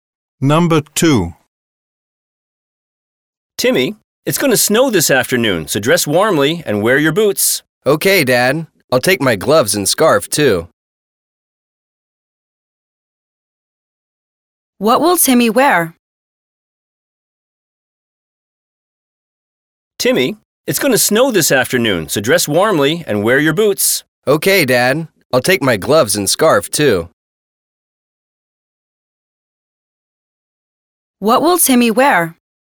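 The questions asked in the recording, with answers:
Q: What will Timmy wear?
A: Boots, gloves and scarf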